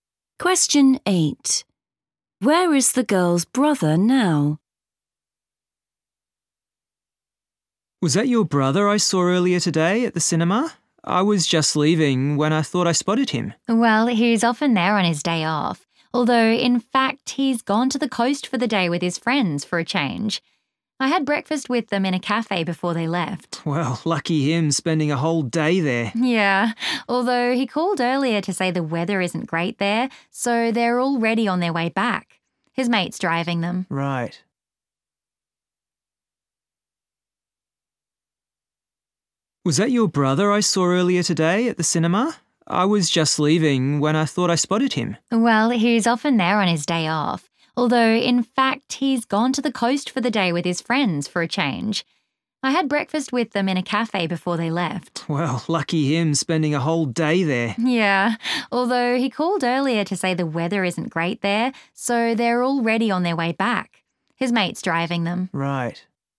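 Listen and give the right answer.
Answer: in his friend's car, on the way back from the coast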